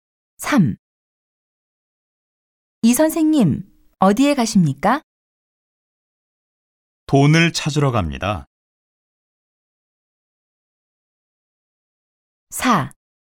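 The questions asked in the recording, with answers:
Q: 이 선생님, 어디에 가십니까?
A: 은행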